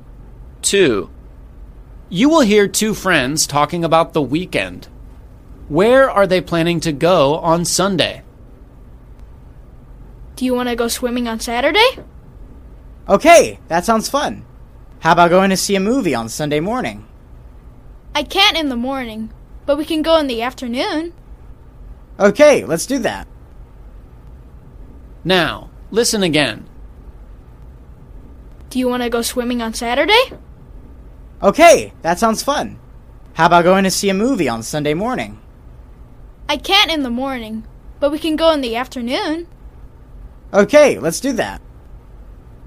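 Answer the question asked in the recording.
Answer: To the movies (in the afternoon)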